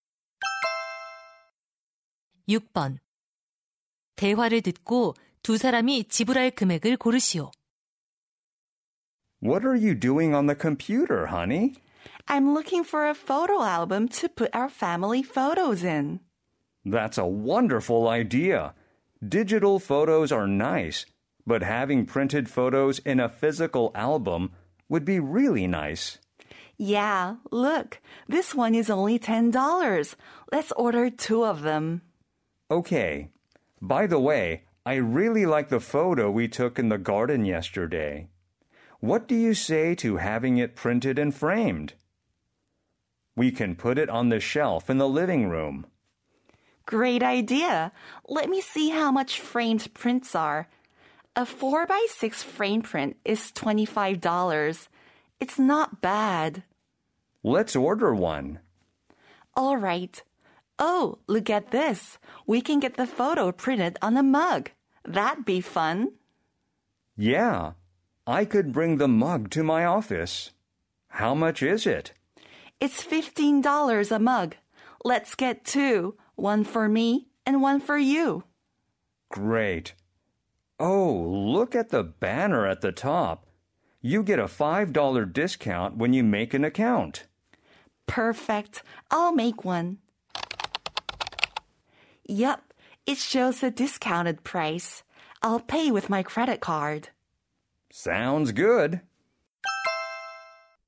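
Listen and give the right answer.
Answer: $70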